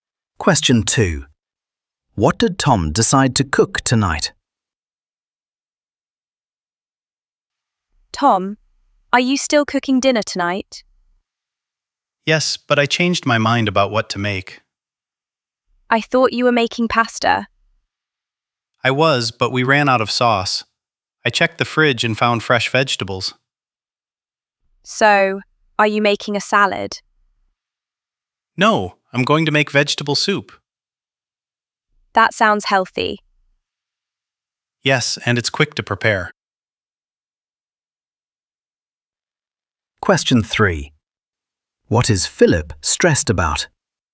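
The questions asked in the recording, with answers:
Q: What did Tom decide to cook tonight?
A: vegetable soup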